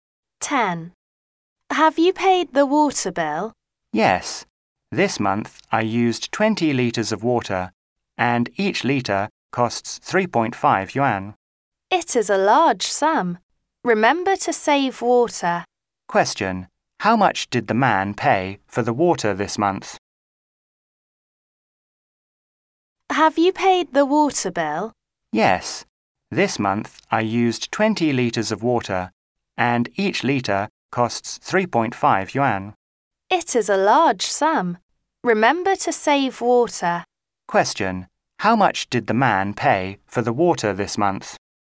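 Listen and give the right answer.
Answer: 70 yuan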